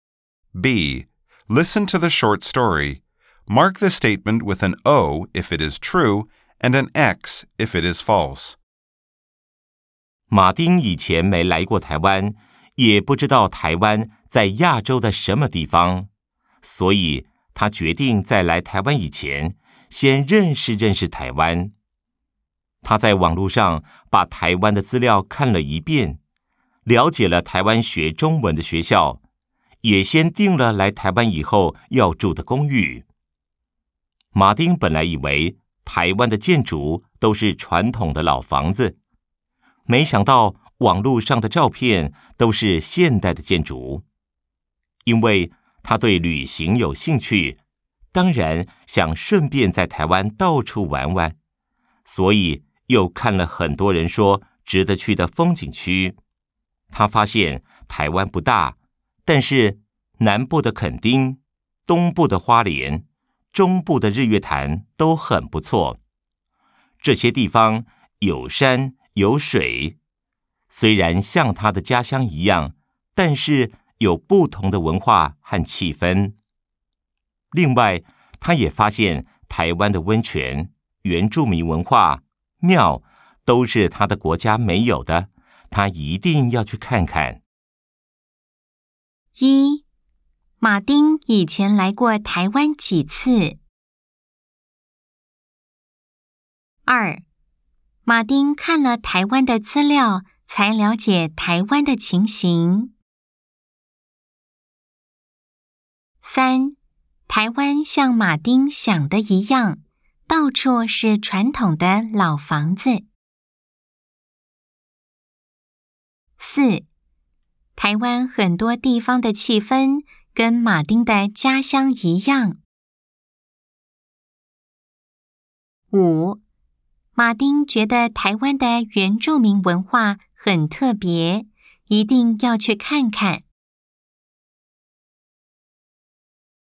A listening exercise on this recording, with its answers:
B. Nghe câu chuyện ngắn. Đánh dấu O nếu đúng, x nếu sai.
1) 馬丁以前來過台灣幾次。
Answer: Sai

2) 馬丁看了台灣的資料才了解台灣的情形。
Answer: Đúng

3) 台灣像馬丁想的一樣,到處是傳統的老房子。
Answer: Sai

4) 台灣很多地方的氣氛跟馬丁的家鄉一樣。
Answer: Sai

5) 馬丁覺得台灣的原住民文化很特別,一定要去看看。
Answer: Đúng

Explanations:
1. vì đoạn văn nói rõ: 🔊 馬丁以前沒來過台灣。
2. vì trong đoạn văn có nói: 🔊 他在網路上把台灣的資料看了一遍,了解了台灣學中文的學校...
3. vì đoạn văn nói: 🔊 馬丁本來以為台灣的建築都是傳統的老房子,沒想到網路上的照片都是現代的建築。
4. vì trong đoạn có nói: 🔊 雖然像他的家鄉一樣,但是有不同的文化和氣氛。 (Mặc dù giống quê anh ấy, nhưng có văn hóa và bầu không khí khác biệt.)
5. vì trong đoạn văn có nói: 🔊 他也發現台灣的溫泉、原住民文化、廟,都是他的國家沒有的,他一定要去看看。